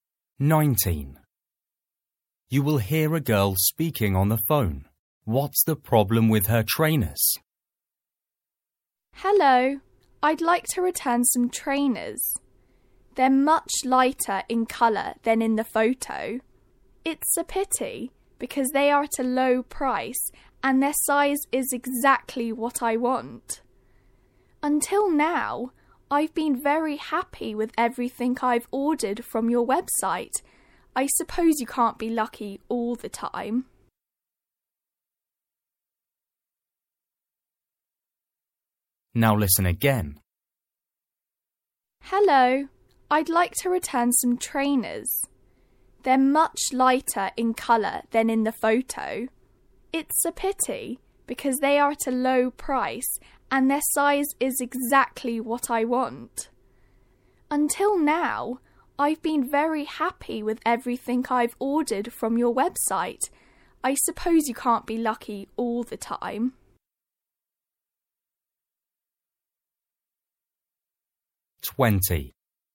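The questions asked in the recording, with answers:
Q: What's the problem with her trainers?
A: the colour is much lighter than in the photo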